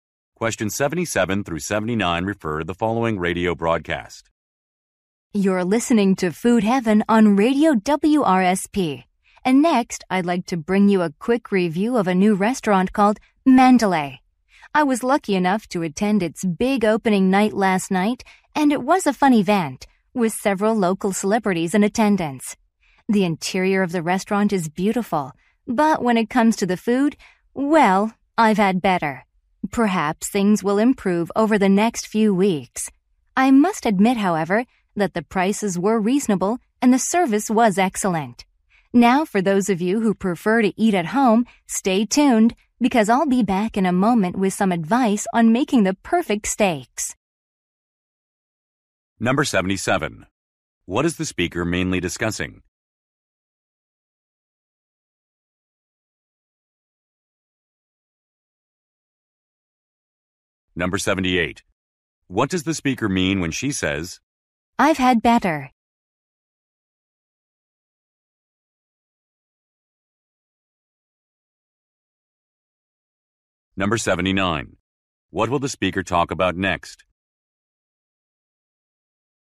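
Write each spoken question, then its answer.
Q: What is the speaker mainly discussing?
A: A review of a new restaurant

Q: What does the speaker mean when she says,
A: The food was disappointing

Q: What will the speaker talk about next?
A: Advice on cooking the perfect steak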